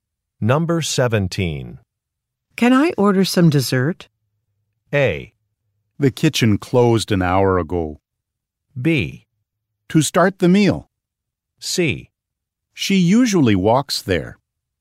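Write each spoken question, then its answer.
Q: Can I order some dessert?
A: A: The kitchen closed an hour ago.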